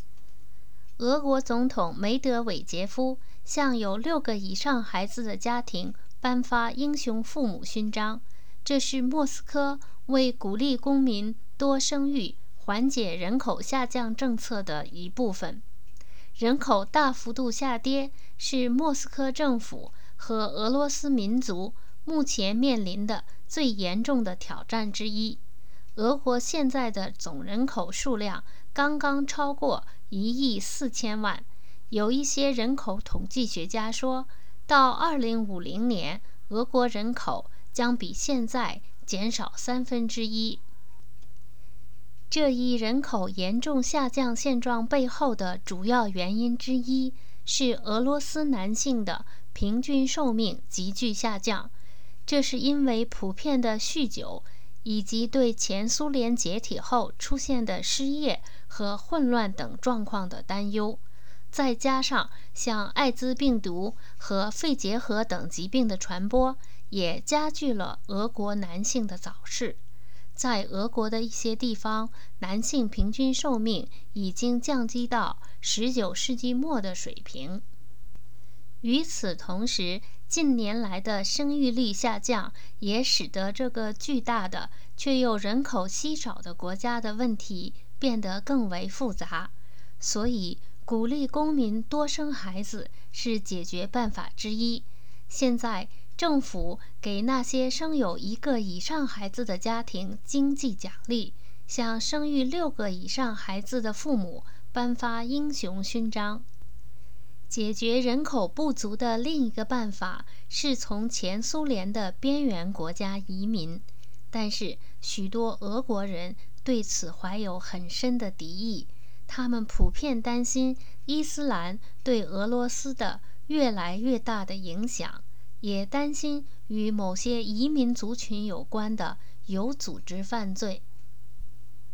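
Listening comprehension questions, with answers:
Please answer the following questions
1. 俄国现在的总人口数量是多少?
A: 刚刚超过1亿4000万

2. 俄罗斯男性的平均寿命急剧下降的原因有哪些?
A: 普遍酗酒,对前苏联解体后失业和混乱的担忧,以及艾滋病毒和肺结核等疾病的传播

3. 政府用什么办法鼓励公民多生育孩子?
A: 给生有一个以上孩子的家庭经济奖励,向生育六个以上孩子的父母颁发英雄勋章

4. 多数俄国人对从前苏联的边缘国家移民是什么态度?为什么?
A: 怀有很深的敌意,因为担心伊斯兰的影响越来越大,也担心与某些移民族群有关的有组织犯罪

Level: M.Phil Year 2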